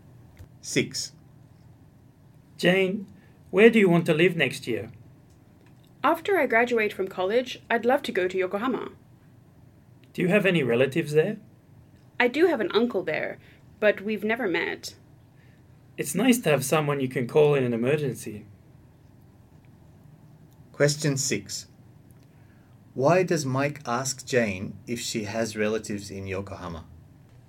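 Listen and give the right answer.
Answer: Because it's nice to have someone to call in an emergency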